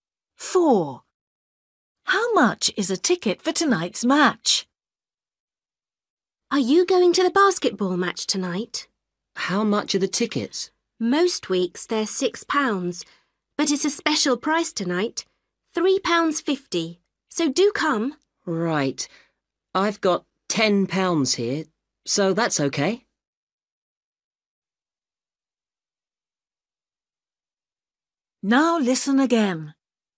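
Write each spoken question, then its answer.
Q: How much is a ticket for tonight's match?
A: £3.50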